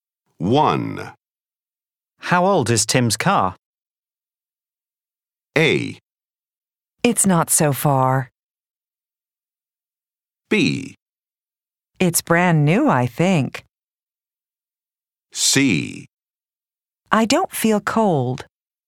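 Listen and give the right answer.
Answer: B: It's brand new, I think.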